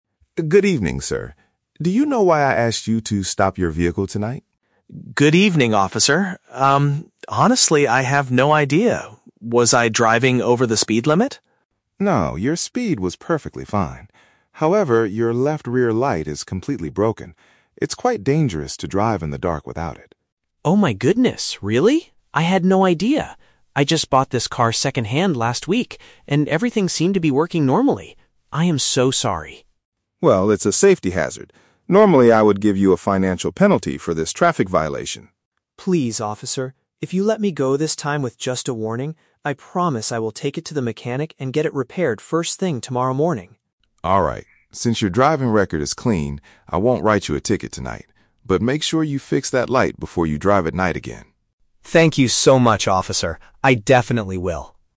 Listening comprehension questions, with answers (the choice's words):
Listen to the conversation between a driver and a police officer. Choose the correct answer (A, B, or C) for each question.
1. Why did the police officer stop the driver?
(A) The driver was going too fast on the road.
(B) One of the lights on the back of the car is not working.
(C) The driver did not stop at a red traffic signal.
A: One of the lights on the back of the car is not working.

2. What does the driver say about his car?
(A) He recently purchased it from a previous owner.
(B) He recently took it to a local mechanic for a check-up.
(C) He borrowed it from a family member for the evening.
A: He recently purchased it from a previous owner.

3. How does the officer resolve the situation?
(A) He forces the driver to pay a financial penalty immediately.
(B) He tells the driver to leave the car on the side of the road.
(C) He gives a verbal warning and allows the driver to leave.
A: He gives a verbal warning and allows the driver to leave.

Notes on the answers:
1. The officer says, "your left rear light is completely broken." A rear light is a light on the back of the car, and broken means not working. The Trap (A): The driver asks, "Was I driving over the speed limit?" (going too fast), but the officer clearly answers, "No, your speed was perfectly fine." Plausible but not mentioned (C): Running a red light is a common traffic violation, but they do not talk about traffic signals in this conversation.
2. The driver explains, "I just bought this car second-hand last week." Buying a car second-hand means purchasing it from a previous owner. The Trap (B): The driver mentions a "mechanic," but he says he will take the car to the mechanic tomorrow morning. He didn't do it recently. Plausible but not mentioned (C): Borrowing a car is a reasonable excuse for not knowing it was broken, but he clearly says he bought it.
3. The driver asks for "just a warning", and the officer agrees, saying "I won't write you a ticket tonight." This means he is letting the driver go with a warning. The Trap (A): The officer mentions a "financial penalty," but he says he would "normally" do this. Tonight, because the driver's record is clean, he does not force him to pay. Plausible but not mentioned (B): The officer says driving without the light is dangerous, so telling the driver to stop driving sounds logical, but the officer allows him to drive home.

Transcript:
Officer: Good evening, sir. Do you know why I asked you to stop your vehicle tonight?
Driver: Good evening, officer. Um, honestly, I have no idea. Was I driving over the speed limit?
Officer: No, your speed was perfectly fine. However, your left rear light is completely broken. It's quite dangerous to drive in the dark without it.
Driver: Oh my goodness, really? I had no idea. I just bought this car second-hand last week, and everything seemed to be working normally. I am so sorry.
Officer: Well, it's a safety hazard. Normally, I would give you a financial penalty for this traffic violation.
Driver: Please, officer. If you let me go this time with just a warning, I promise I will take it to the mechanic and get it repaired first thing tomorrow morning.
Since your driving record is clean, I won't write you a ticket tonight. But make sure you fix that light before you drive at night again.